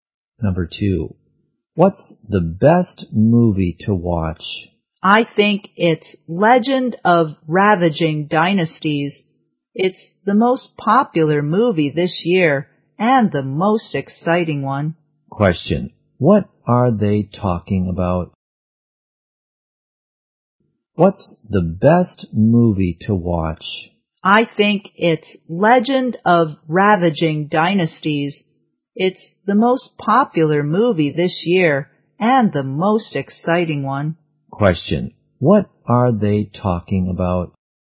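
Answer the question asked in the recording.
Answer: A movie.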